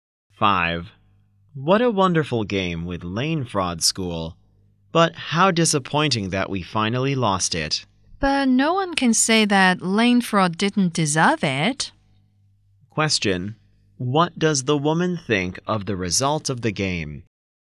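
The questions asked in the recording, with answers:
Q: What does the woman think of the result of the game?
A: Lane Fraud deserved to win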